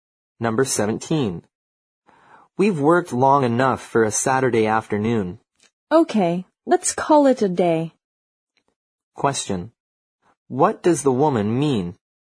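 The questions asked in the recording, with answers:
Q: What does the woman mean?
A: They should stop working for the day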